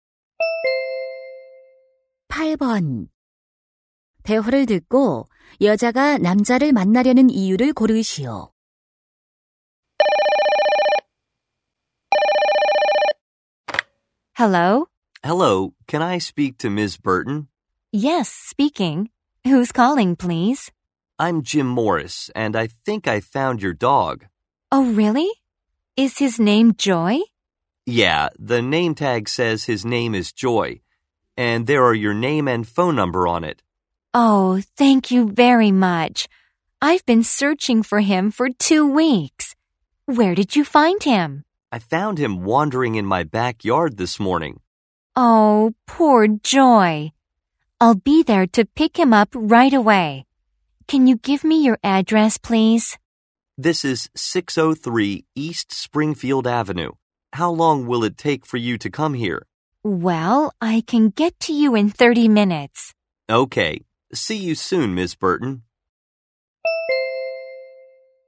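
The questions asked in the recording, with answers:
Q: 대화를 듣고 여자가 남자를 만나려는 이유를 고르시오.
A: 잃어버린 개를 데려가기 위해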